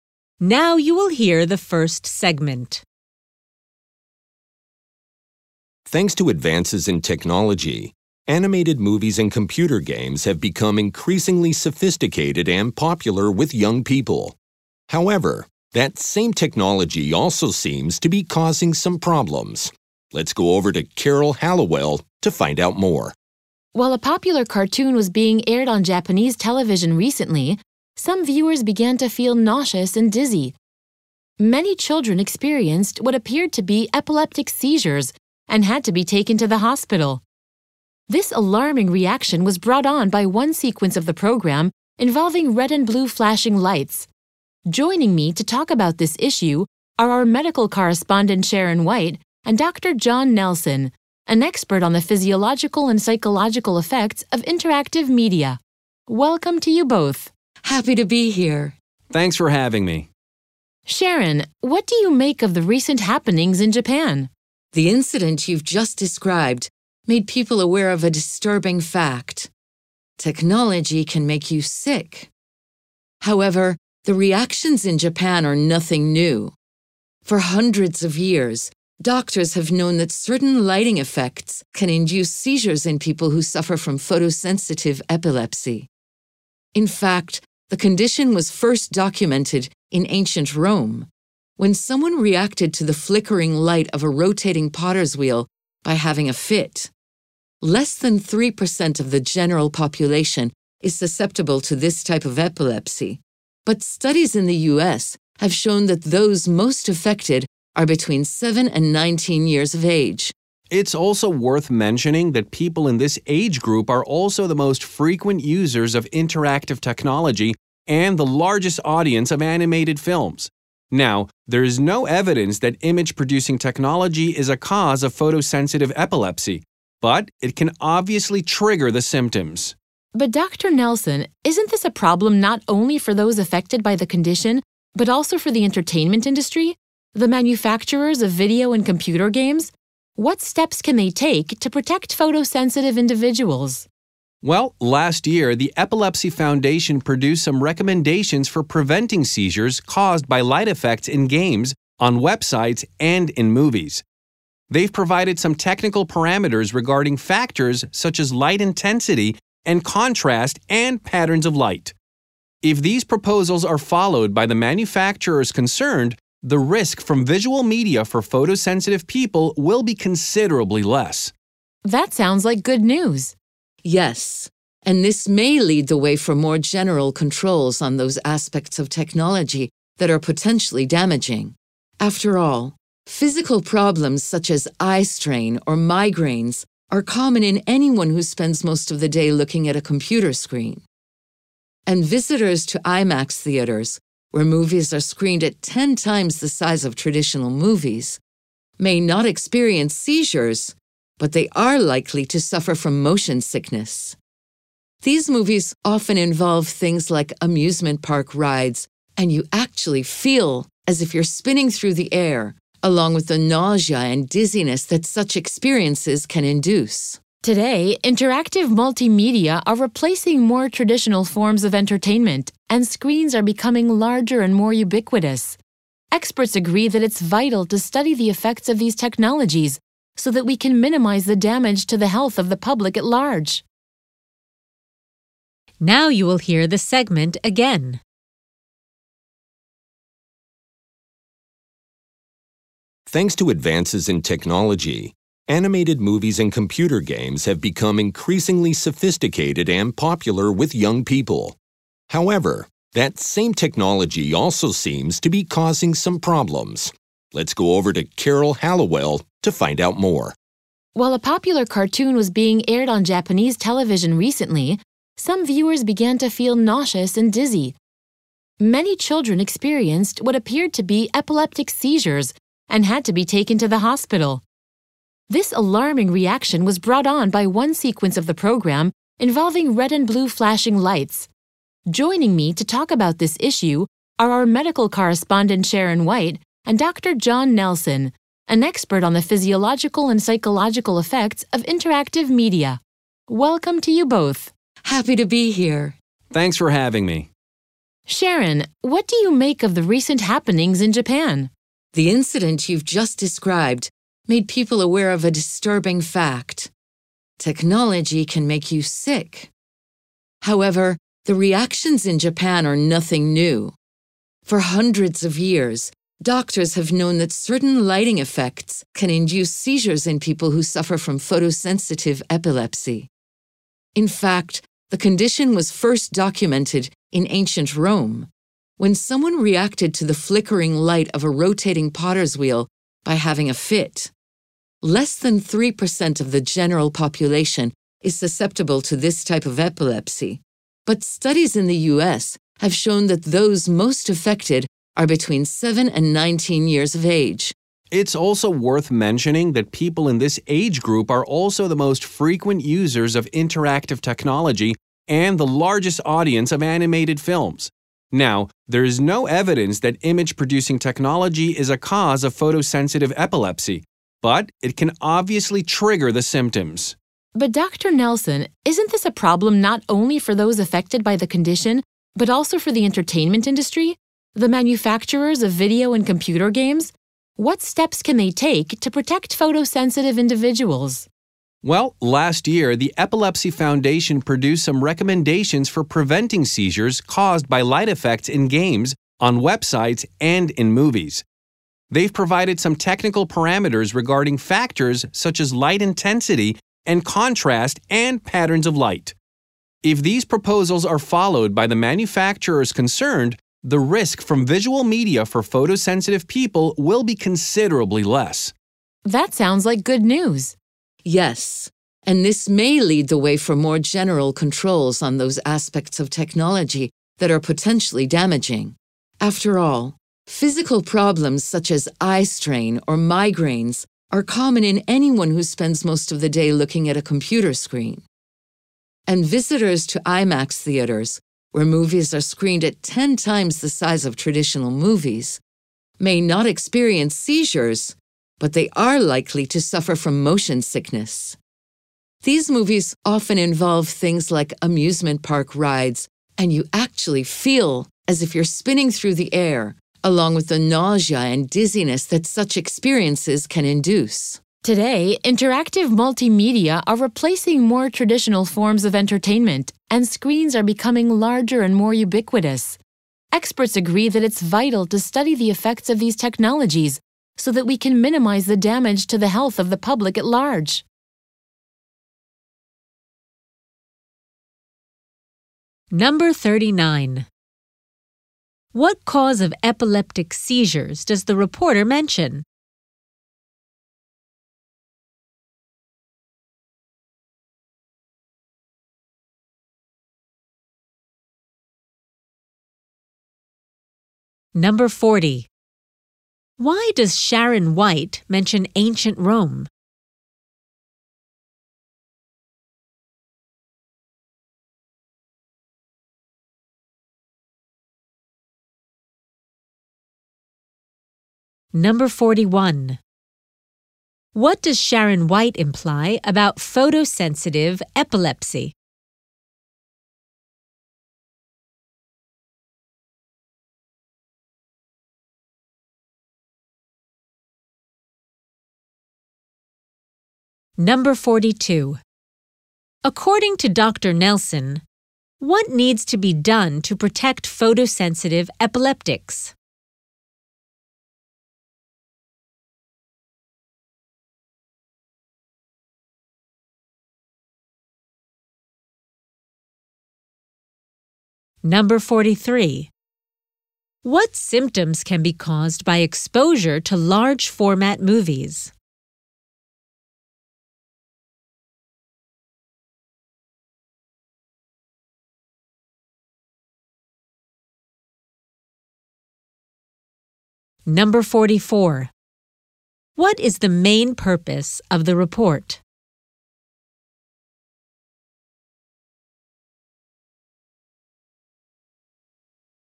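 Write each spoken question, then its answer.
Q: What cause of epileptic seizures does the reporter mention?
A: Red and blue flashing lights in a cartoon sequence

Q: Why does Sharon White mention ancient Rome?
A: To show the condition has been known for a long time; it was first documented there

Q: Nelson, what needs to be done to protect photosensitive epileptics?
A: Manufacturers should follow the Epilepsy Foundation's technical recommendations on light effects

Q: What symptoms can be caused by exposure to large format movies?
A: Motion sickness: nausea and dizziness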